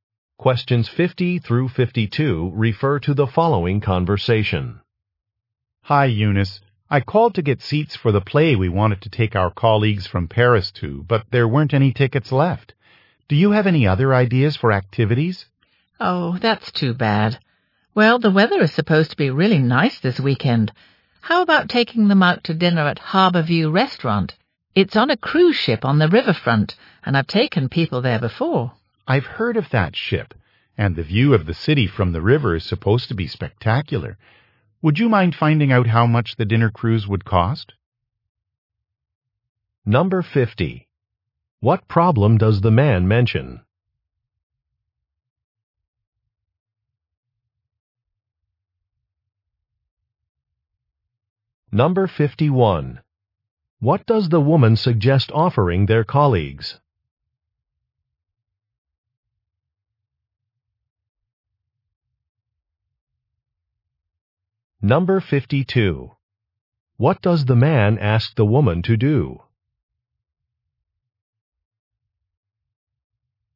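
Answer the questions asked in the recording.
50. The play tickets were sold out
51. Dinner on a river cruise ship
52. Find out the cost of the dinner cruise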